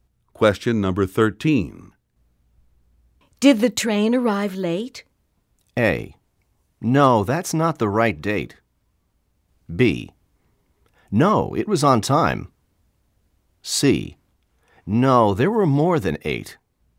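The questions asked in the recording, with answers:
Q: Did the train arrive late?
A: B: No, it was on time.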